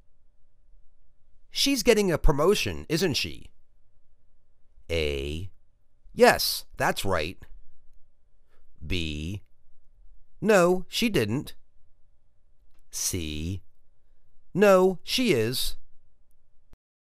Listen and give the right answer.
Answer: Yes, that's right.